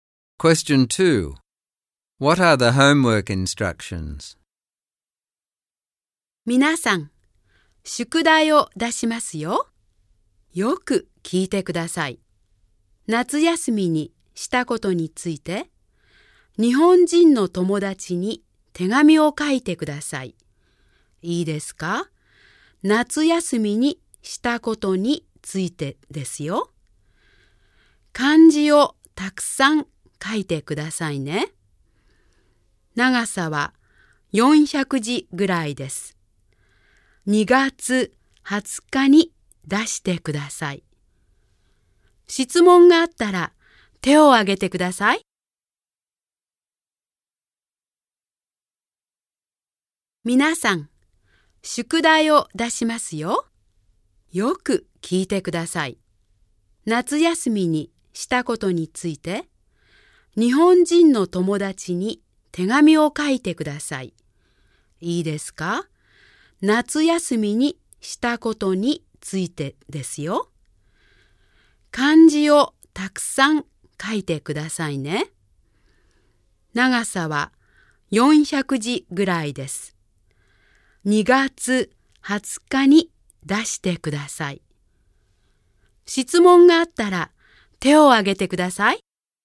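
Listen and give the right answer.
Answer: Write a letter of about 400 characters to a Japanese friend about what they did in the summer holidays, using lots of kanji; hand it in on 20 February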